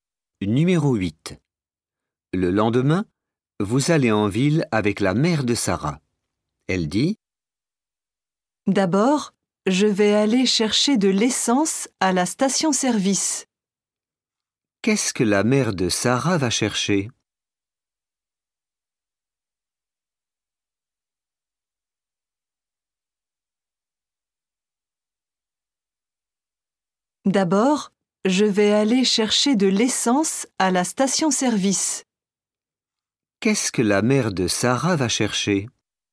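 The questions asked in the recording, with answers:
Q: Qu'est-ce que la mère de Sarah va chercher?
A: De l'essence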